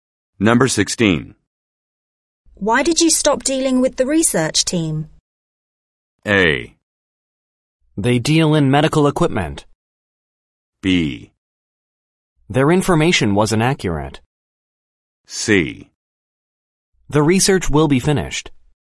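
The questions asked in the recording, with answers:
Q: Why did you stop dealing with the research team?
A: B: Their information wasn't accurate.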